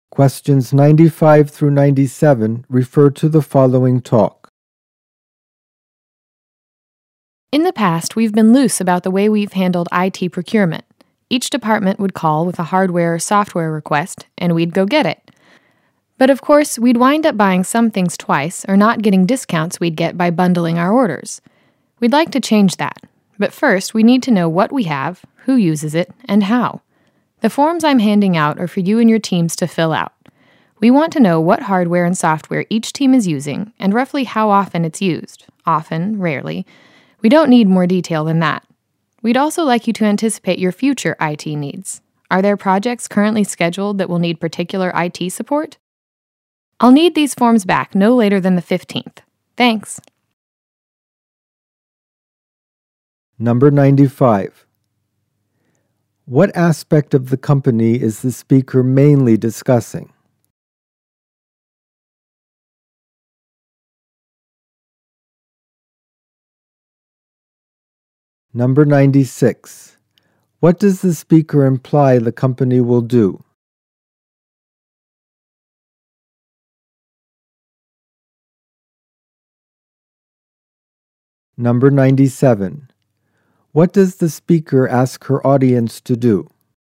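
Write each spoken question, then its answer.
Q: What aspect of the company is the speaker mainly discussing?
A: How it buys IT equipment and software (IT procurement)

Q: What does the speaker imply the company will do?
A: Bundle IT orders centrally to avoid duplicate purchases and get discounts

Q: What does the speaker ask her audience to do?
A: Fill out forms on their teams' IT use and needs by the 15th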